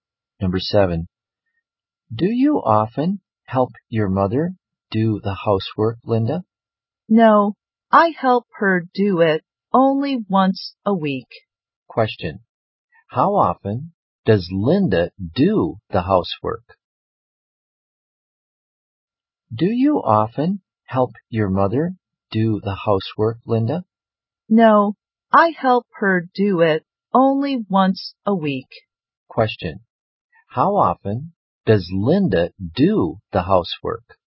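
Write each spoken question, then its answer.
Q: How often does Linda do the housework?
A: Once a week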